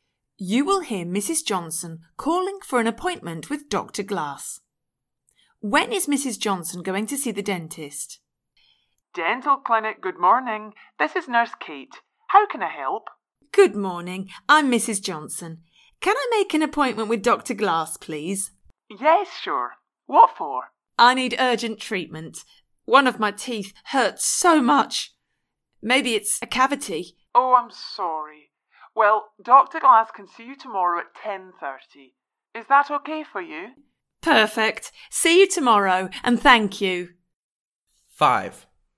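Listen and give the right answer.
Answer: Tomorrow at 10:30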